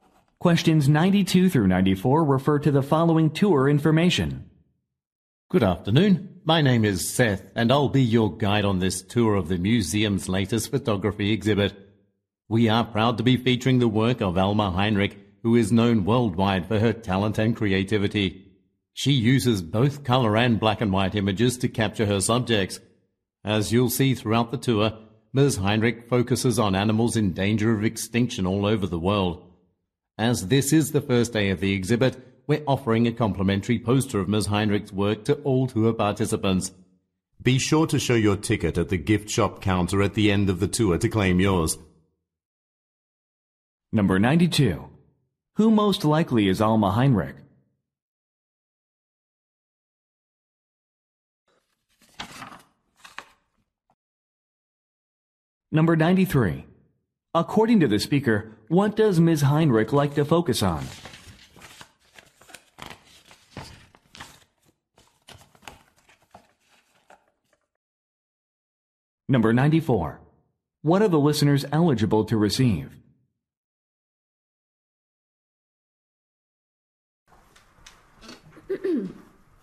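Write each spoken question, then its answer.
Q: Who most likely is Alma Heinrich?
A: A photographer

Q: Heinrich like to focus on?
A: Endangered animals

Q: What are the listeners eligible to receive?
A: A free poster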